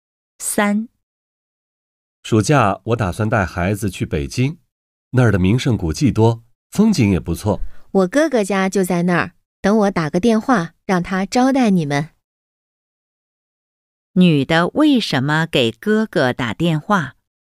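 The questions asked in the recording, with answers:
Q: 女的为什么给哥哥打电话?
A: 让哥哥招待他们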